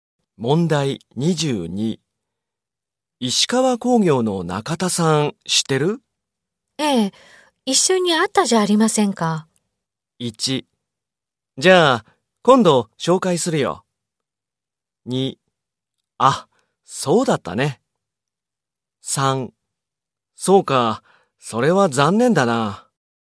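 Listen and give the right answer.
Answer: 2: あ、そうだったね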